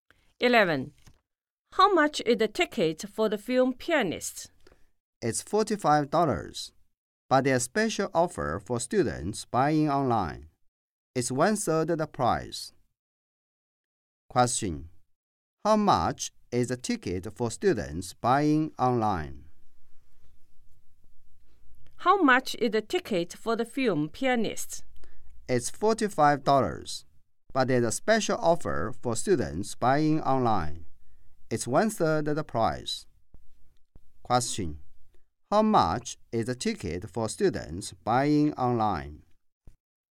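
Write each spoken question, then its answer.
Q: How much is the ticket for students buying online?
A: $15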